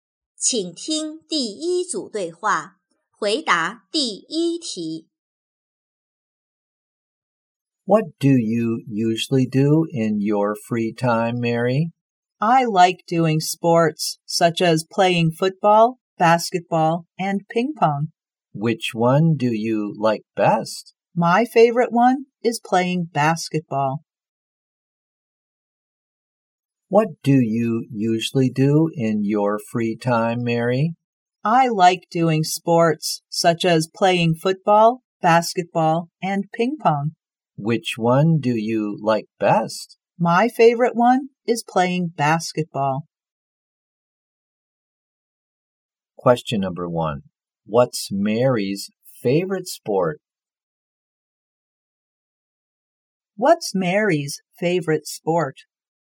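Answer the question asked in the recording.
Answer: Playing basketball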